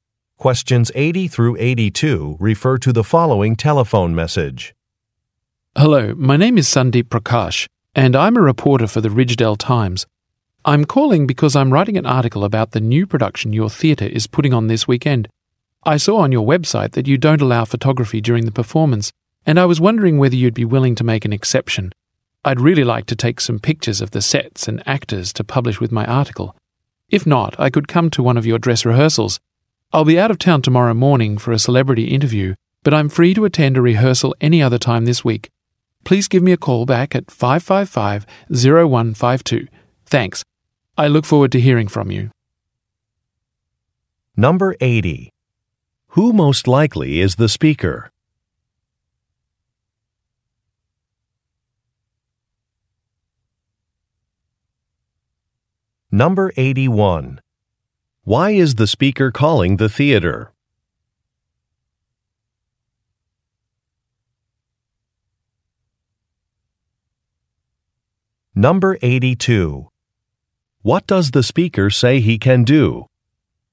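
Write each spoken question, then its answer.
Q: Who most likely is the speaker?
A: A newspaper reporter

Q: Why is the speaker calling the theater?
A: To ask permission to take photographs during the performance

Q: What does the speaker say he can do?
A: Come to a dress rehearsal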